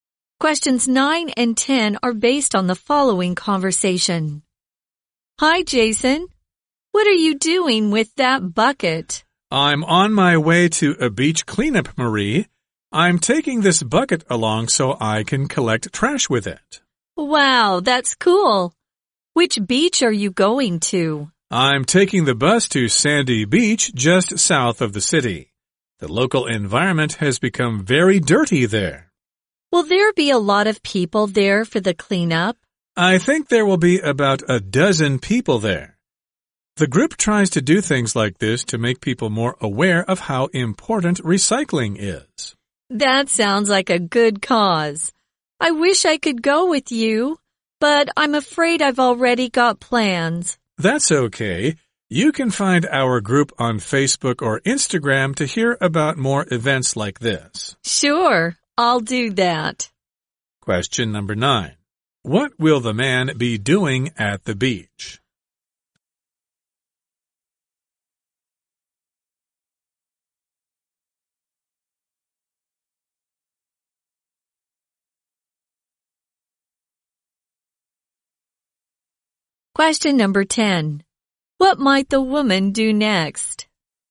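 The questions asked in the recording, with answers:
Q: What will the man be doing at the beach?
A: Collecting trash at a beach cleanup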